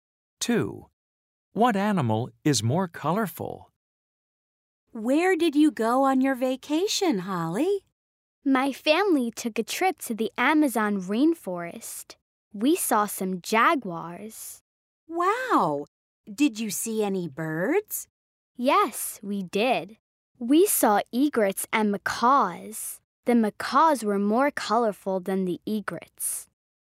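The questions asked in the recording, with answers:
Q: What animal is more colorful?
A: The macaws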